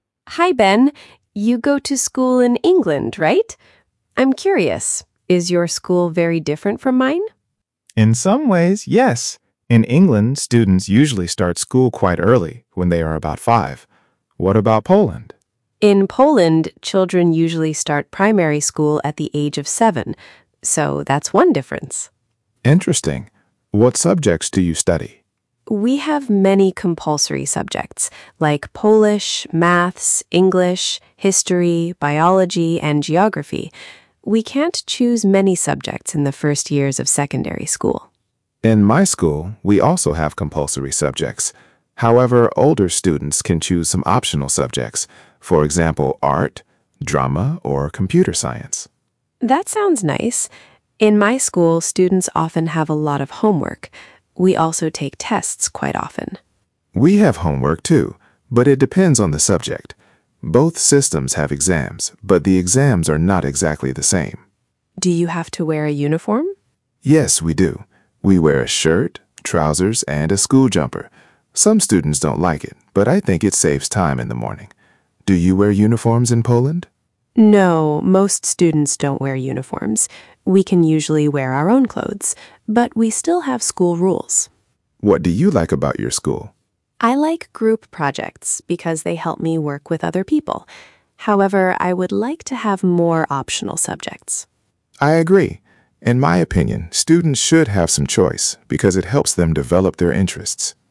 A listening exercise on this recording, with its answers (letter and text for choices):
Przeczytaj pytania, a potem posłuchaj i wybierz właściwą odpowiedź.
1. What are Ania and Ben talking about?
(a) their holidays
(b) schools in Poland and England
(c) their favourite films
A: (b) schools in Poland and England

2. What is the main purpose of the conversation?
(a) to compare two school systems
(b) to describe one classroom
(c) to complain about homework only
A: (a) to compare two school systems

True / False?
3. In England, students usually start school at about five.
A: True

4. In Poland, children usually start primary school at seven.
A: True

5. Ania says Polish students can choose many subjects in the first years of secondary school.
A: False

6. Ben says older students can choose some optional subjects.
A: True

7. Ben does not wear a school uniform.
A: False

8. Ania likes group projects.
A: True

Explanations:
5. they can't choose many subjects.
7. he wears a shirt, trousers and a school jumper.

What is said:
Ania: Hi, Ben. You go to school in England, right? I'm curious. Is your school very different from mine?
Ben: In some ways, yes. In England, students usually start school quite early, when they are about five. What about Poland?
Ania: In Poland, children usually start primary school at the age of seven. So that's one difference.
Ben: Interesting. What subjects do you study?
Ania: We have many compulsory subjects, like Polish, maths, English, history, biology and geography. We can't choose many subjects in the first years of secondary school.
Ben: In my school, we also have compulsory subjects. However, older students can choose some optional subjects, for example art, drama or computer science.
Ania: That sounds nice. In my school, students often have a lot of homework. We also take tests quite often.
Ben: We have homework too, but it depends on the subject. Both systems have exams, but the exams are not exactly the same.
Ania: Do you have to wear a uniform?
Ben: Yes, we do. We wear a shirt, trousers and a school jumper. Some students don't like it, but I think it saves time in the morning. Do you wear uniforms in Poland?
Ania: No, most students don't wear uniforms. We can usually wear our own clothes, but we still have school rules.
Ben: What do you like about your school?
Ania: I like group projects because they help me work with other people. However, I would like to have more optional subjects.
Ben: I agree. In my opinion, students should have some choice because it helps them develop their interests.

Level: A2+/B1